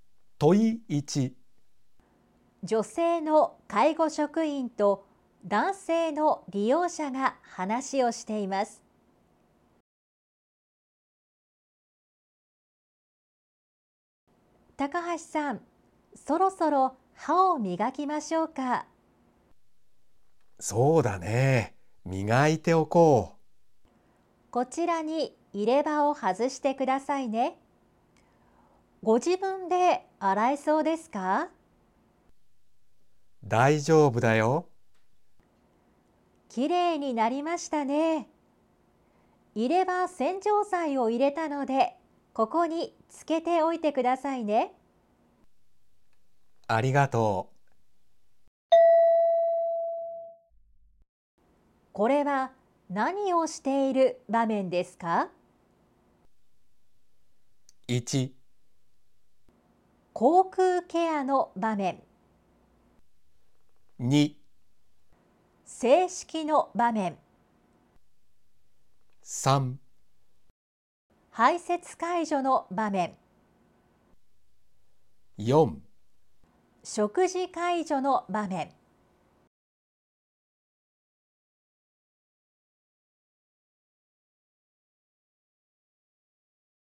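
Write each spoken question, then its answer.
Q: これは何をしている場面ですか?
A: 1: 口腔ケアの場面。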